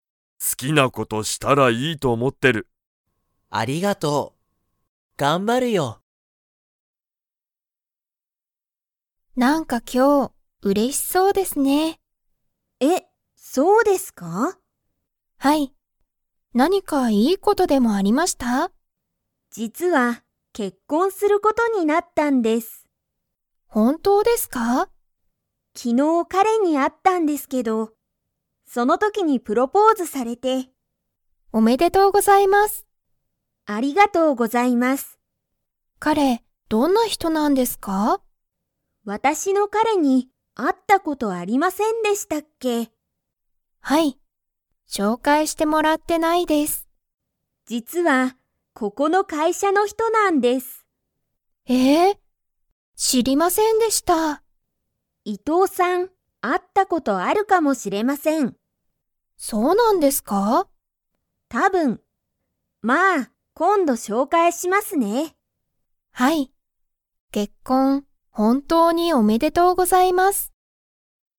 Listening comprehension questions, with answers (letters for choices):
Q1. 小林こばやしさんは、いつプロポーズされましたか?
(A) 今日きょう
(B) 昨日きのう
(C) 月曜日げつようび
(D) 火曜日かようび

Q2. 小林こばやしさんは、彼かれを伊藤いとうさんに 。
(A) 紹介しょうかいする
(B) 紹介しょうかいしない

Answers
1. B
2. A

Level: Level 3